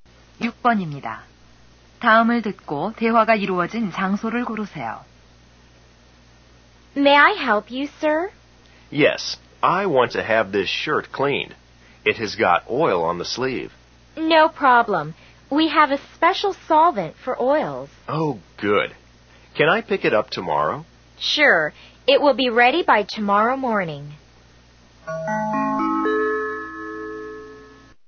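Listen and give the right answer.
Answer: 세탁소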